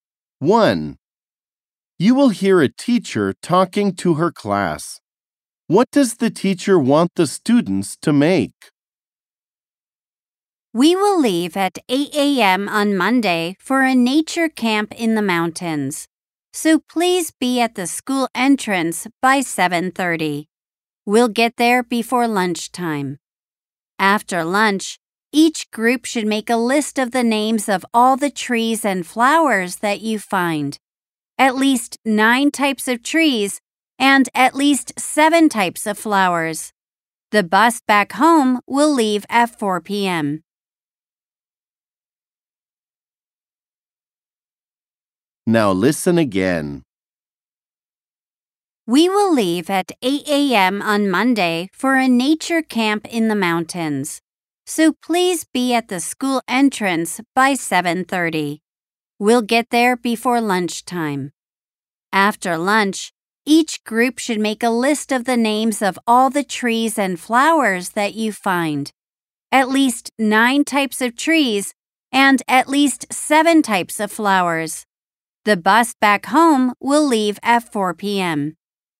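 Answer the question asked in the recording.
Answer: A list of the names of the trees and flowers they find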